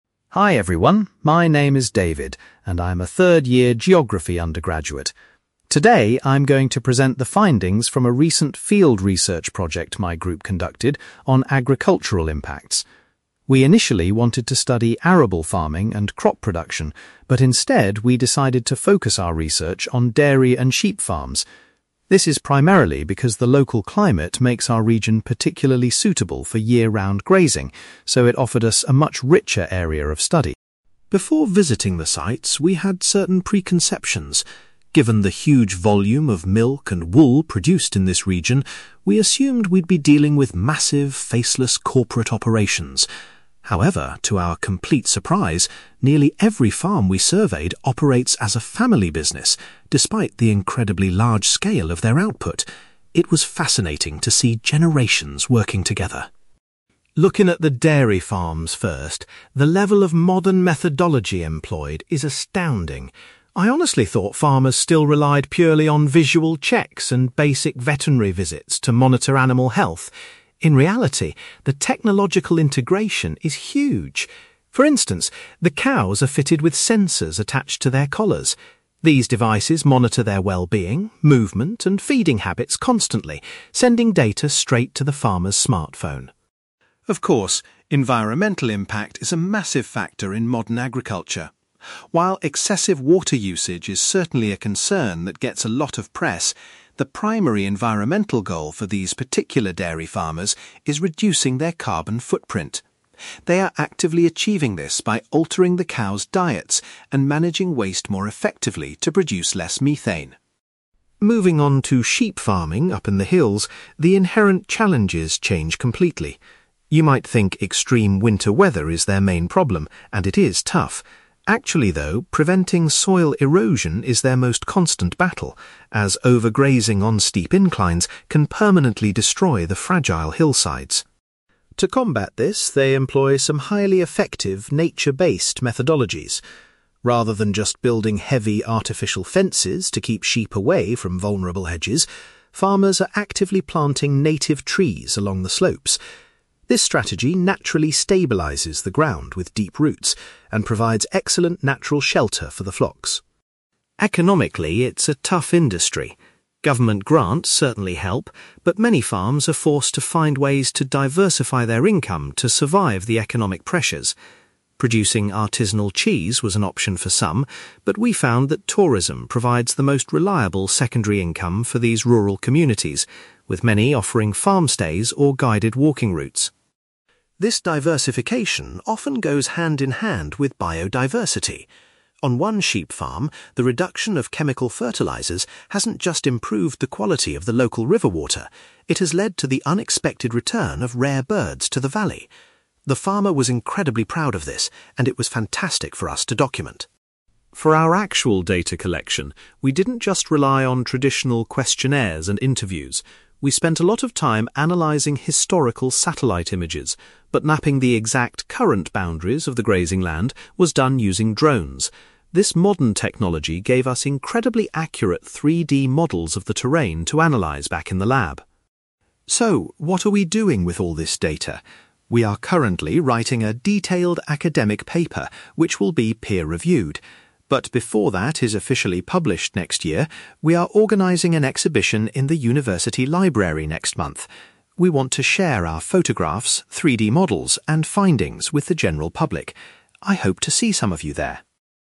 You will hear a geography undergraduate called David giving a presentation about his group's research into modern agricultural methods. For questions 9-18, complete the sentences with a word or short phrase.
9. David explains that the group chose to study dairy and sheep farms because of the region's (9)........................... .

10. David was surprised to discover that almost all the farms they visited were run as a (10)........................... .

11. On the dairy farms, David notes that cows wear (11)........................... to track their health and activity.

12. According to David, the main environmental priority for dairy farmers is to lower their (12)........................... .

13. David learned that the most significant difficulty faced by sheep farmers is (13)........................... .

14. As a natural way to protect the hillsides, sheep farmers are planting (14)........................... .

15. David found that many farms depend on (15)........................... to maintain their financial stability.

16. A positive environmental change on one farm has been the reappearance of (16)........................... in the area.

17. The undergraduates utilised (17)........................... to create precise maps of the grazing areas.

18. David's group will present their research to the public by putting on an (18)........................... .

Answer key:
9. climate
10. family business
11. sensors
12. carbon footprint
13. soil erosion
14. native trees
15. tourism
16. rare birds
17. drones
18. exhibition

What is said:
David: Hi everyone, my name is David, and I'm a third-year geography undergraduate. Today, I'm going to present the findings from a recent field research project my group conducted on agricultural impacts. We initially wanted to study arable farming and crop production, but instead, we decided to focus our research on dairy and sheep farms. This is primarily because the local climate makes our region particularly suitable for year-round grazing, so it offered us a much richer area of study.
Before visiting the sites, we had certain preconceptions. Given the huge volume of milk and wool produced in this region, we assumed we'd be dealing with massive, faceless corporate operations. However, to our complete surprise, nearly every farm we surveyed operates as a family business, despite the incredibly large scale of their output. It was fascinating to see generations working together.
Looking at the dairy farms first, the level of modern methodology employed is astounding. I honestly thought farmers still relied purely on visual checks and basic veterinary visits to monitor animal health. In reality, the technological integration is huge. For instance, the cows are fitted with sensors attached to their collars. These devices monitor their wellbeing, movement, and feeding habits constantly, sending data straight to the farmer's smartphone.
Of course, environmental impact is a massive factor in modern agriculture. While excessive water usage is certainly a concern that gets a lot of press, the primary environmental goal for these particular dairy farmers is reducing their carbon footprint. They are actively achieving this by altering the cows' diets and managing waste more effectively to produce less methane.
Moving on to sheep farming up in the hills, the inherent challenges change completely. You might think extreme winter weather is their main problem, and it is tough. Actually, though, preventing soil erosion is their most constant battle, as overgrazing on steep inclines can permanently destroy the fragile hillsides.
To combat this, they employ some highly effective, nature-based methodologies. Rather than just building heavy artificial fences to keep sheep away from vulnerable edges, farmers are actively planting native trees along the slopes. This strategy naturally stabilises the ground with deep roots and provides excellent natural shelter for the flocks.
Economically, it's a tough industry. Government grants certainly help, but many farms are forced to find ways to diversify their income to survive the economic pressures. Producing artisanal cheese was an option for some, but we found that tourism provides the most reliable secondary income for these rural communities, with many offering farm-stays or guided walking routes.
This diversification often goes hand-in-hand with biodiversity. On one sheep farm, the reduction of chemical fertilisers hasn't just improved the quality of the local river water; it has led to the unexpected return of rare birds to the valley. The farmer was incredibly proud of this, and it was fantastic for us to document.
For our actual data collection, we didn't just rely on traditional questionnaires and interviews. We spent a lot of time analysing historical satellite images, but mapping the exact, current boundaries of the grazing land was done using drones. This modern technology gave us incredibly accurate 3D models of the terrain to analyse back in the lab.
So, what are we doing with all this data? We are currently writing a detailed academic paper, which will be peer-reviewed. But before that is officially published next year, we are organising an exhibition in the university library next month. We want to share our photographs, 3D models, and findings with the general public. I hope to see some of you there!

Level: B2